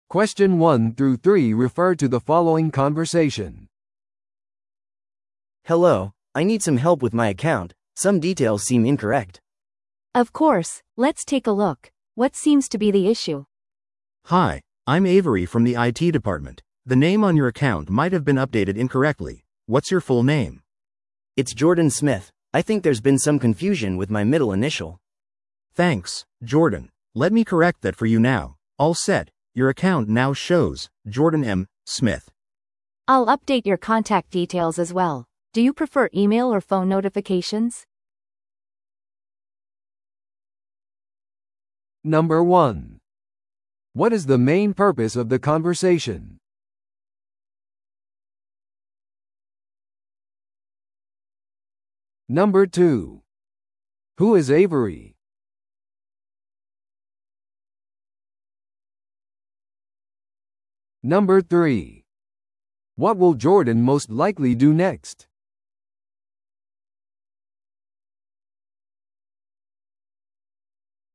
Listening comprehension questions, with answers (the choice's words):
Listen to the audio below and answer the questions.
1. What is the main purpose of the conversation?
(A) 顧客のために新しい口座を開設する。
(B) 顧客の口座の詳細を更新する。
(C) 顧客の口座のセキュリティ違反を報告する。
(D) 顧客の取引履歴を確認する。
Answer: 顧客の口座の詳細を更新する。

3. What will Jordan most likely do next?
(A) 口座に更新された名前を確認する。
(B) ミドルネームの変更を申請する。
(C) 好みの通知方法を選択する。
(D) 前の間違いに関する苦情を申し立てる。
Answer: 好みの通知方法を選択する。

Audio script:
A: Hello, I need some help with my account, some details seem incorrect.
B: Of course, let's take a look. What seems to be the issue?
C: Hi, I'm Avery from the IT department. The name on your account might have been updated incorrectly. What's your full name?
A: It's Jordan Smith. I think there's been some confusion with my middle initial.
C: Thanks, Jordan. Let me correct that for you now. All set, your account now shows 'Jordan M. Smith.'
B: I'll update your contact details as well. Do you prefer email or phone notifications?